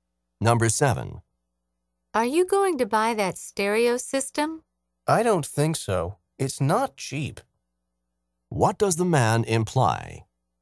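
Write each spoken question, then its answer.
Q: What does the man imply?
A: He won't buy it because it's expensive.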